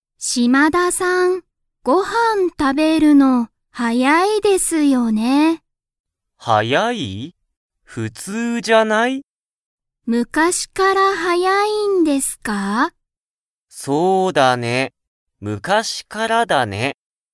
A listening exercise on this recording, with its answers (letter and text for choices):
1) 島田(しまだ)さんは、ご飯(はん)を食(た)べるのが____。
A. 早(はや)い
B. 大(おお)きい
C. かわいい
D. 楽(たの)しい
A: A. 早(はや)い